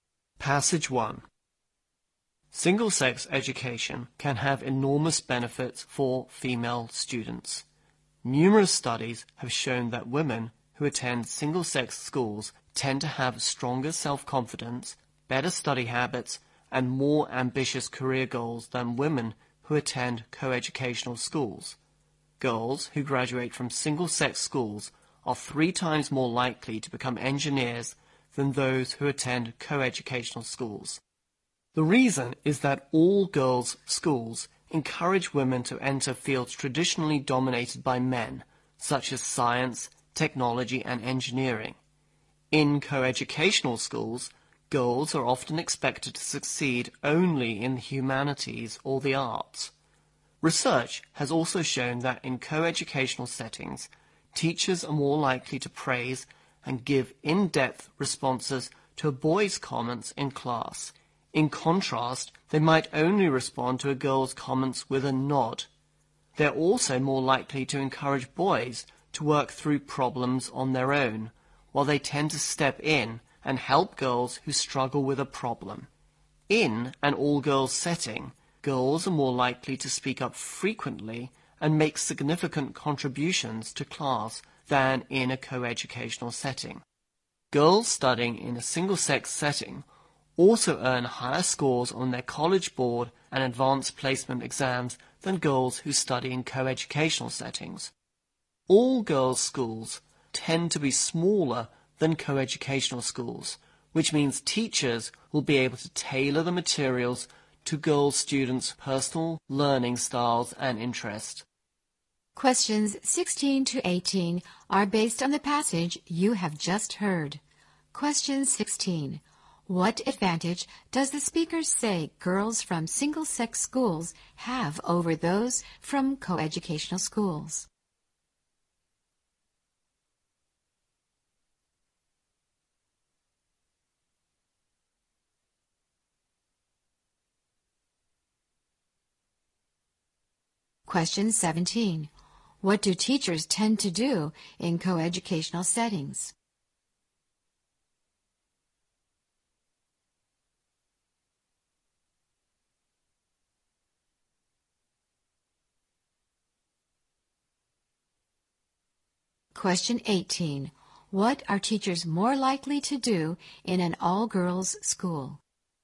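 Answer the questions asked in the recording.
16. Stronger self-confidence, better study habits and more ambitious career goals
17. Give boys more praise and in-depth responses
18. Tailor materials to students' learning styles and interests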